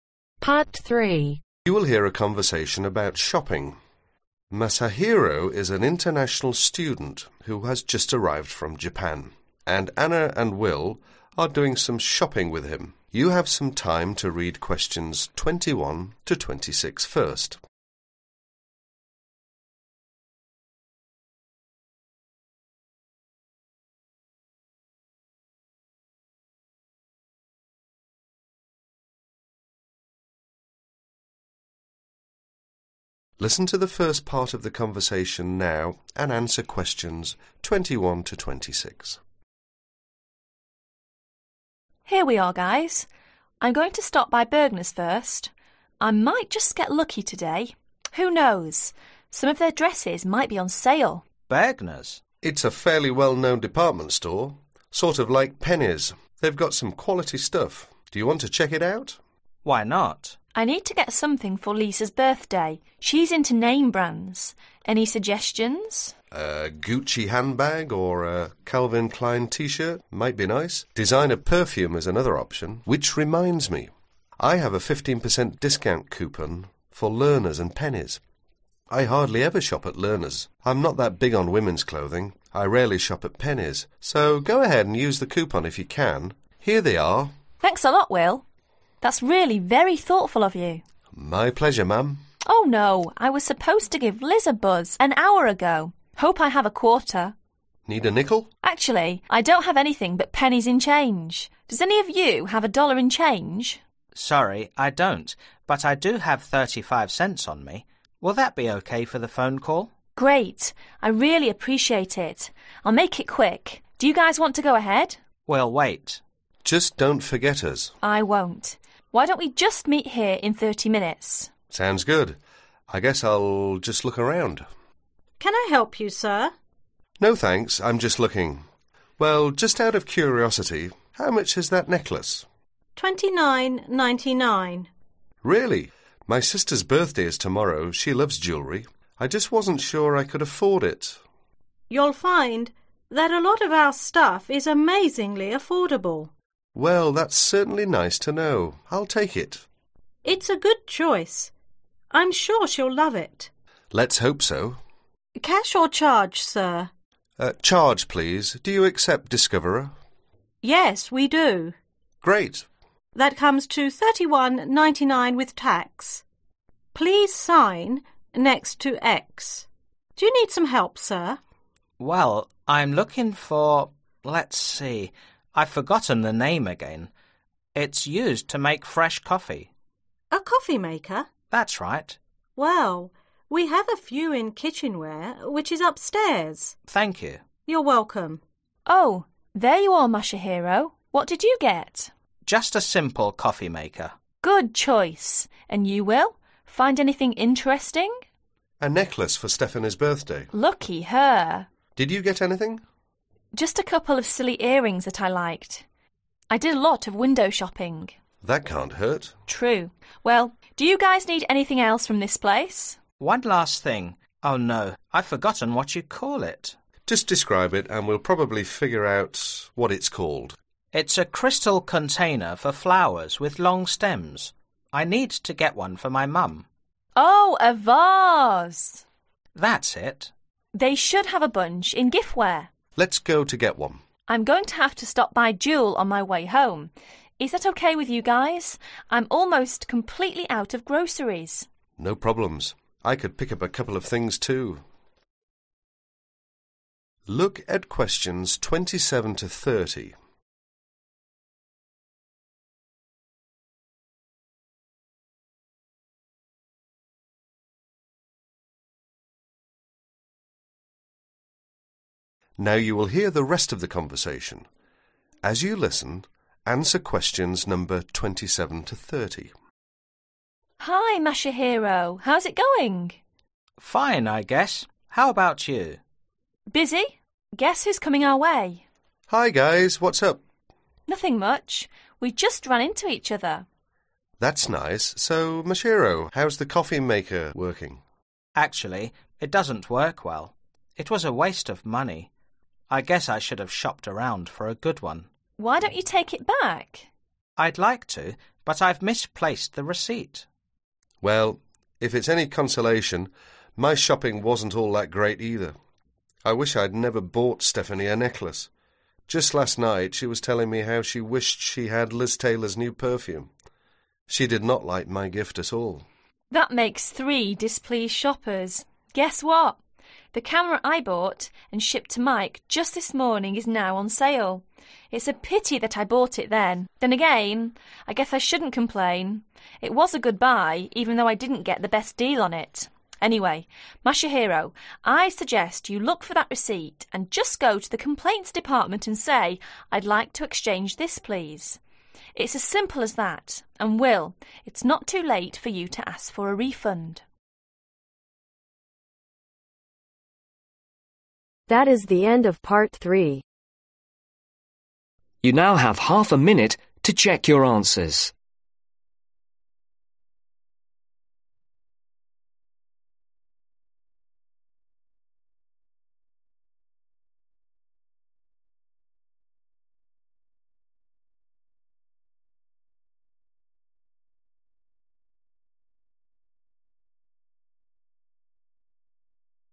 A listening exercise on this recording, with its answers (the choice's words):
Complete the information below.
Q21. Suppose Will is interested in an expensive dress that costs $1285 at Lerner's and Penny's, how much would he pay if products his discount coupon ? $............ .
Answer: 1 092.25

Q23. Bergner's and Penny's are both fairly well-known ............ .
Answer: Department stores

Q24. On the way home, Anna would stop by jewel, which is most likely store that sells ............ .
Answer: Groceries

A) coffee Maker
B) Perfume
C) Earrings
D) Camera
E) Necklace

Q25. Anna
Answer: Earrings

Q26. Masahiro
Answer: coffee Maker

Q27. He was unable to take it back because he had (27)............ the receipt.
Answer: Misplaced

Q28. What she had newly purchased was (28)............ .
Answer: On sale

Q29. Stephanie did not (29)............ his gift.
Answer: Like

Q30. If Masahiro wants to exchange what he has purchased, all that he needs to do is to go to ............ .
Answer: The Complaints Department